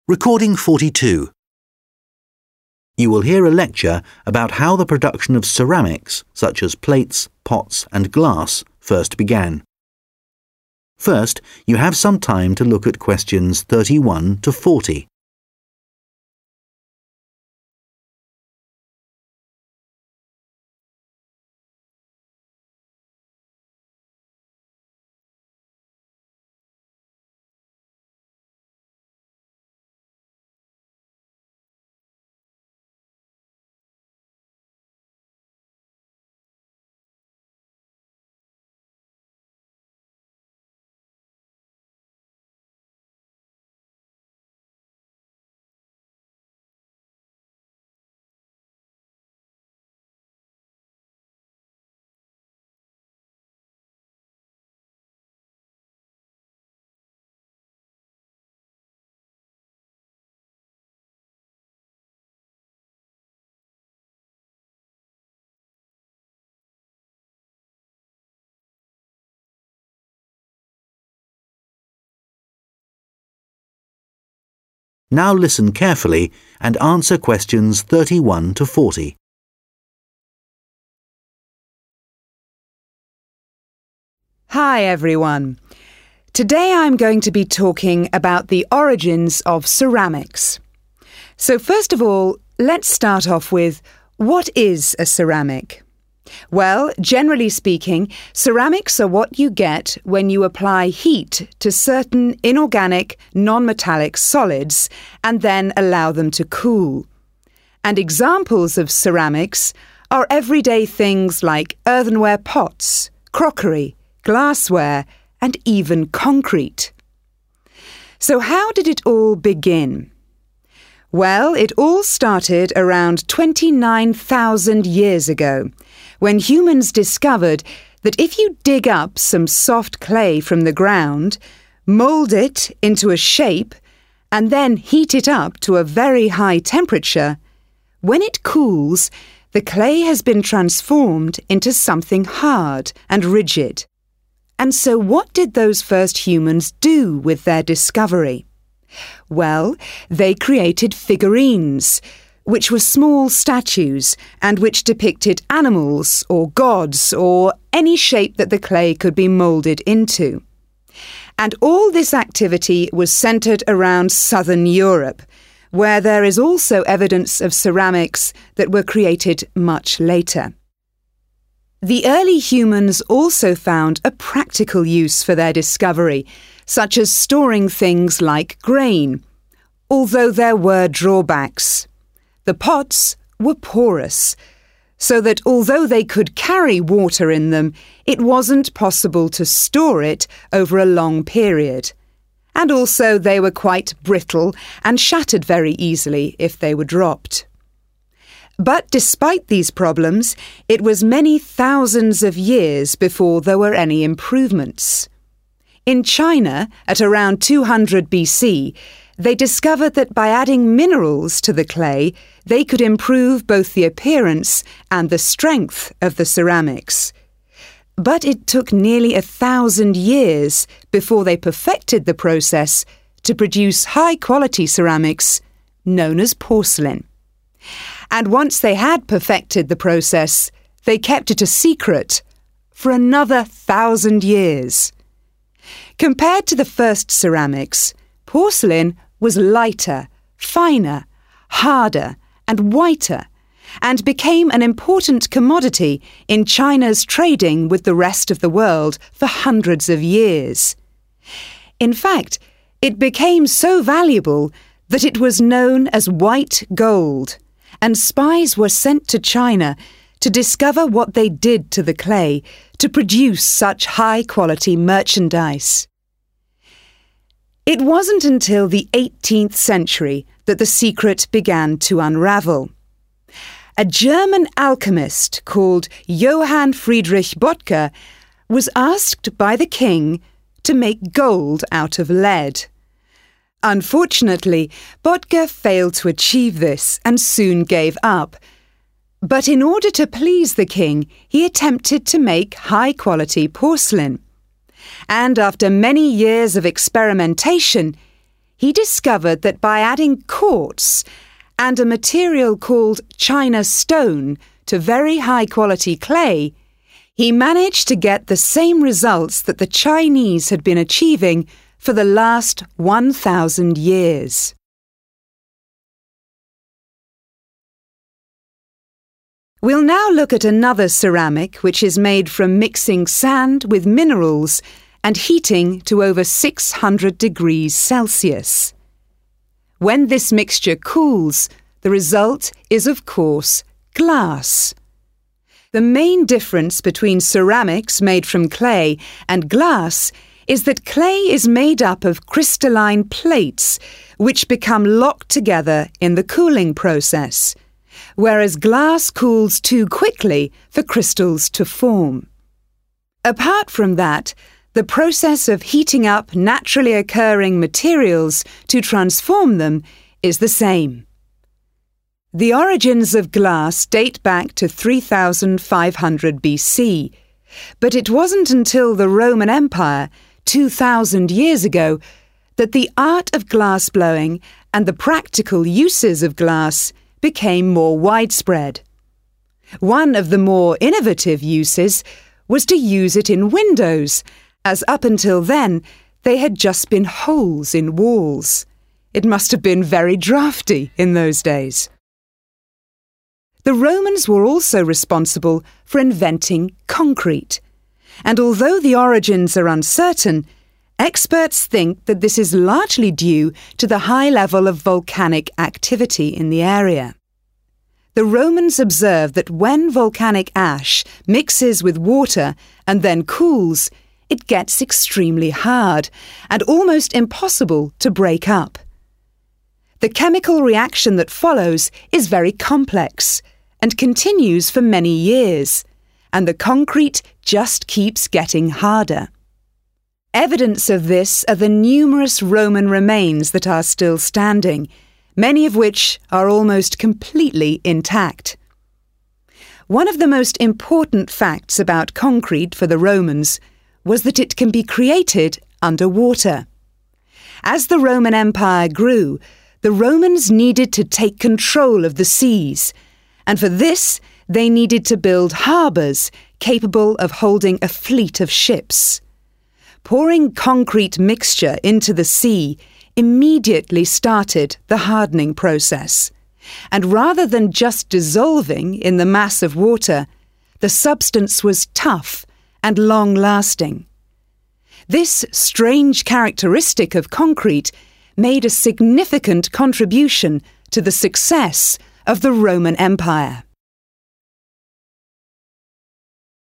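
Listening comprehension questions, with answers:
Complete the sentences below.Write NO MORE THAN TWO WORDS AND/OR A NUMBER for each answer.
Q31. Ceramics date back approximately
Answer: 29,000 years

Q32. The first figurines were made in the area of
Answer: southern Europe

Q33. Early humans could not use their pots to store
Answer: water

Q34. The Chinese improved the quality of ceramics by mixing with the clay.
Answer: minerals

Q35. Chinese porcelain was also called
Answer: white gold

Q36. Bottger added quartz and to clay to make porcelain.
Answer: China stone

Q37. Glass production is similar to clay ceramics apart from the rate of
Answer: cooling

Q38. The Romains introduced the use of glass to make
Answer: windows

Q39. The discovery of concrete is probably due to observing reactions of water and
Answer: volcanic ash

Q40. The ability to build large contributed to the success of the Roman Empire.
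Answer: harbours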